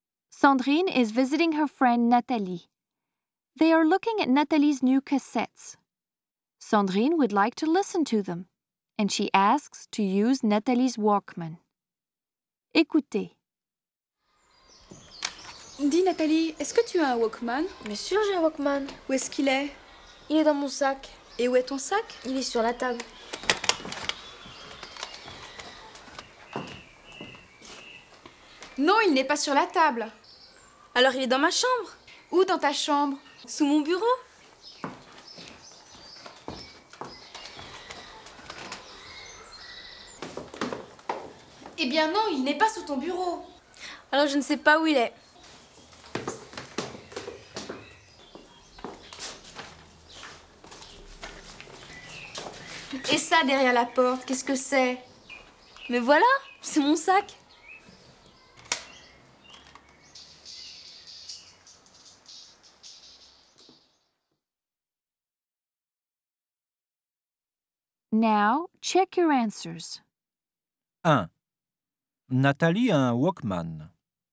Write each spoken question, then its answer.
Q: Nathalie a un Walkman.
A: Vrai.